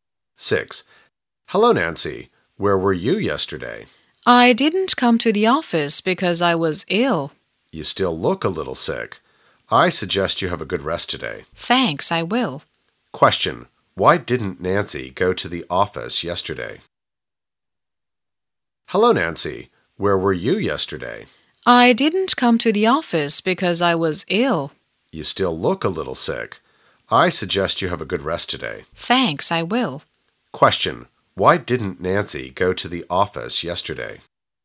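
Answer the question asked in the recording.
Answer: Because she was ill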